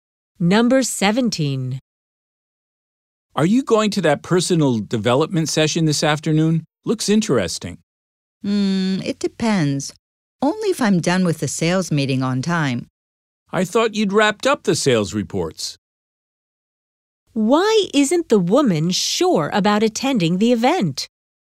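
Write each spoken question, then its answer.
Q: Why isn't the woman sure about attending the event?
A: She may not finish the sales meeting on time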